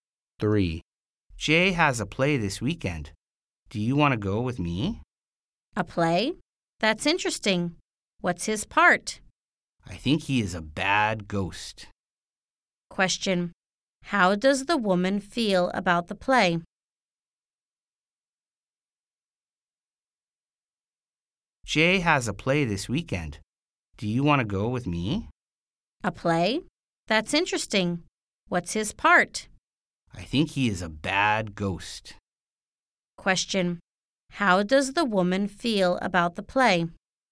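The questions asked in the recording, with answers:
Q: How does the woman feel about the play?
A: She thinks it's interesting.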